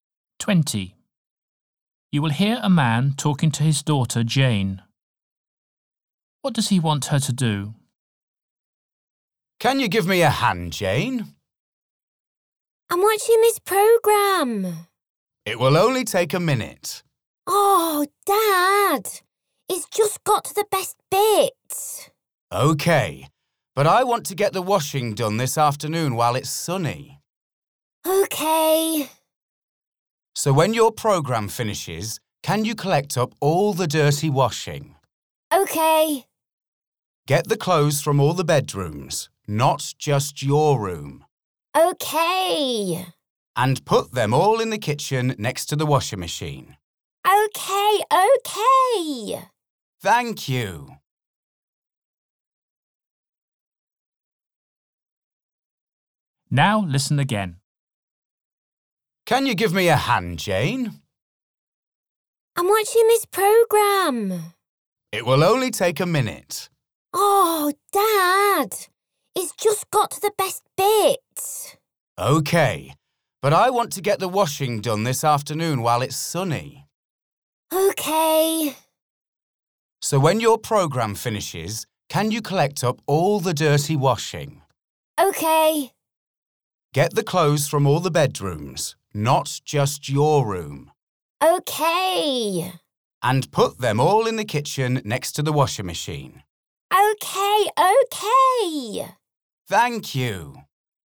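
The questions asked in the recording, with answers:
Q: What does he want her to do?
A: Collect all the dirty washing and put it next to the washing machine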